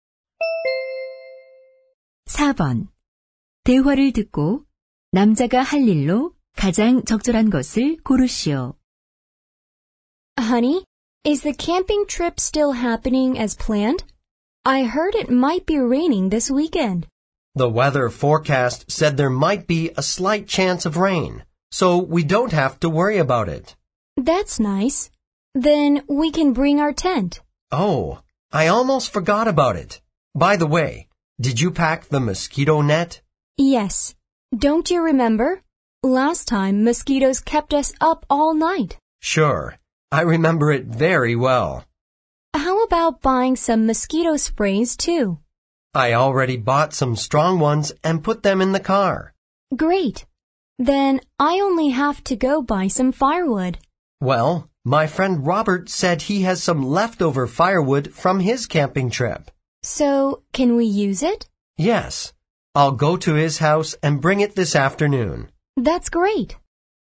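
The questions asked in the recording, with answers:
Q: 대화를 듣고 남자가 할 일로 가장 적절한 것을 고르시오.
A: 로버트의 집에 가서 장작을 가져오기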